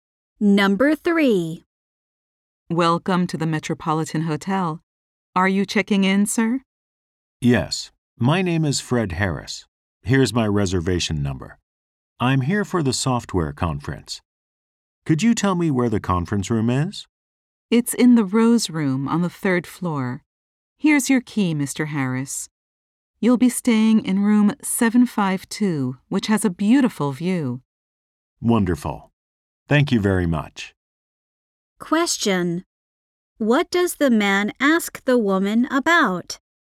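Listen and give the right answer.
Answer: Where the conference room is.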